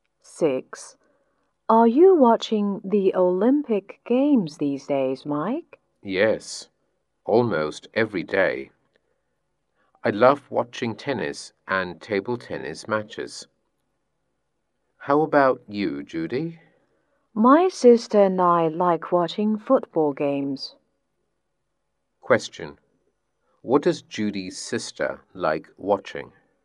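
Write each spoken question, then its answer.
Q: What does Judy's sister like watching?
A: Football games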